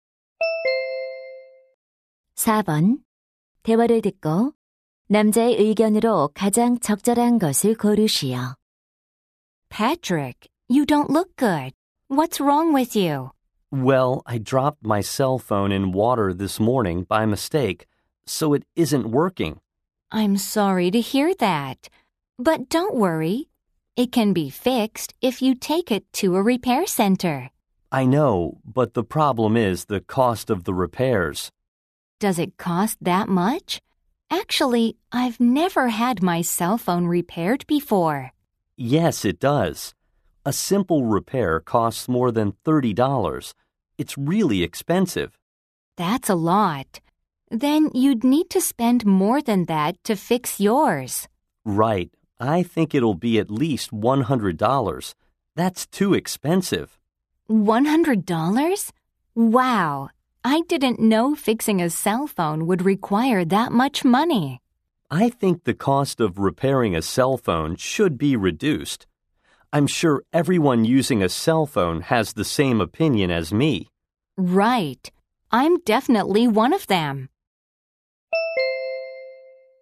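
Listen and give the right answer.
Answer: 휴대폰 수리 비용이 낮아져야 한다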